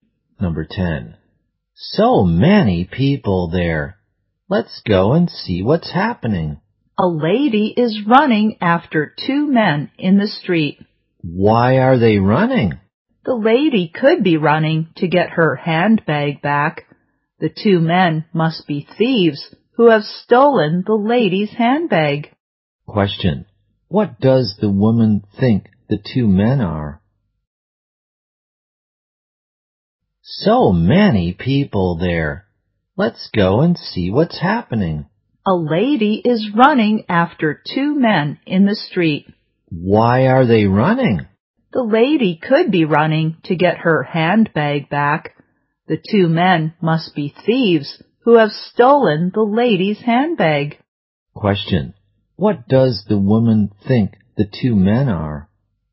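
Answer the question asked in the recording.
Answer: Thieves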